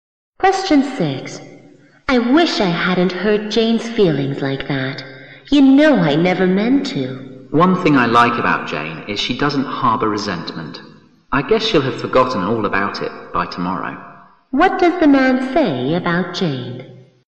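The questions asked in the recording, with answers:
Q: What does the man say about Jane?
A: She doesn't hold grudges and will soon forget it.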